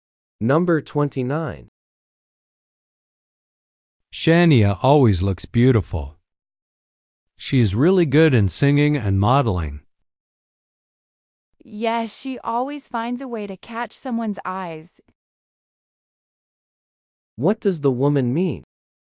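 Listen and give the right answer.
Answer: Shania always gets people's attention.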